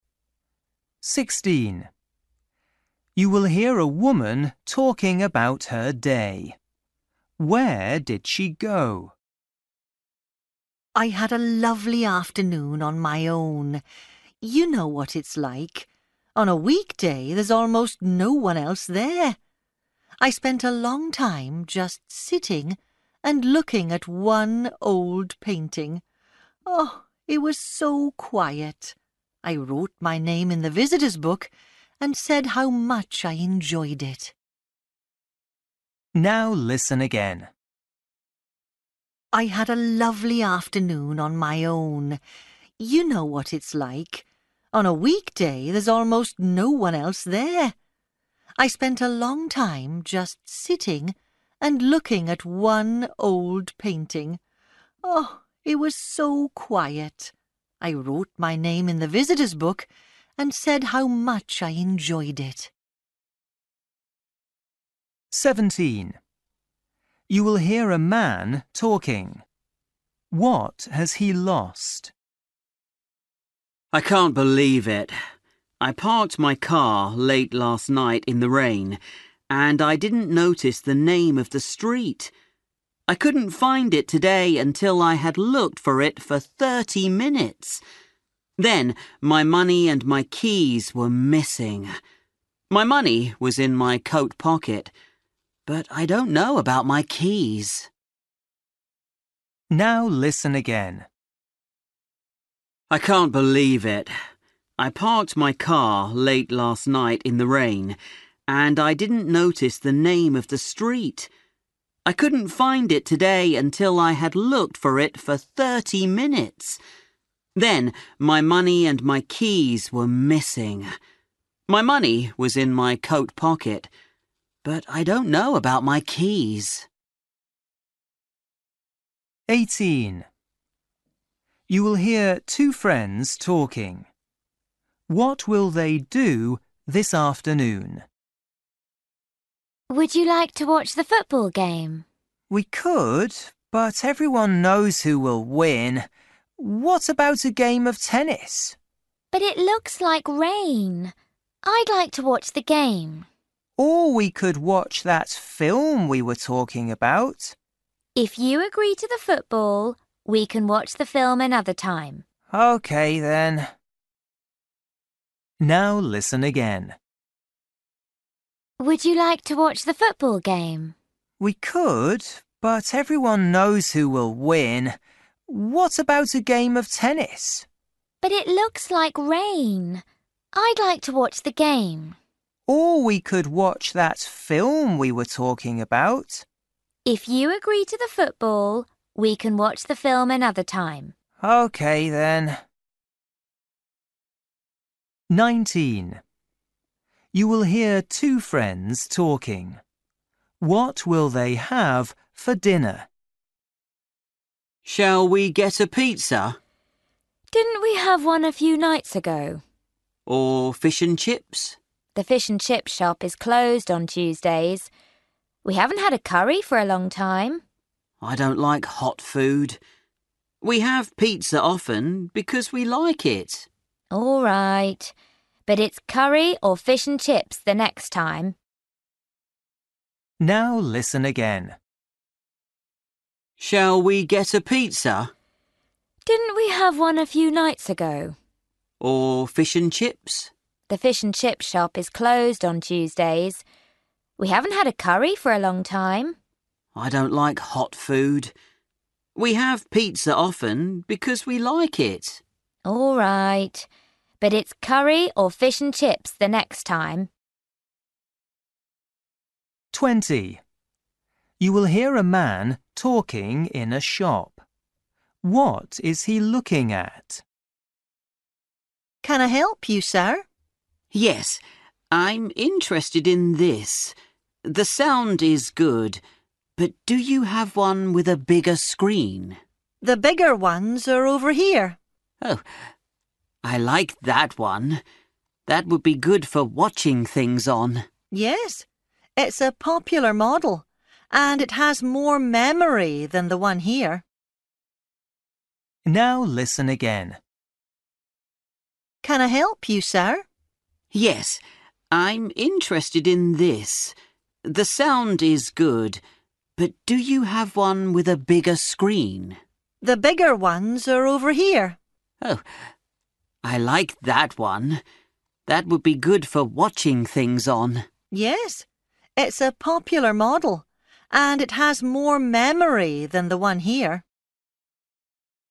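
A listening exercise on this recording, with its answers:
For each question, choose the correct answer.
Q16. You will hear a woman talking about her day. Where did she go?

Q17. You will hear a man talking. What has he lost?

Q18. You will hear two friends talking. What will they do this afternoon?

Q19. You will hear two friends talking. What will they have for dinner?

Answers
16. to an art gallery / museum
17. his keys
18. watch the football game
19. pizza

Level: Luyện nghe trình độ A2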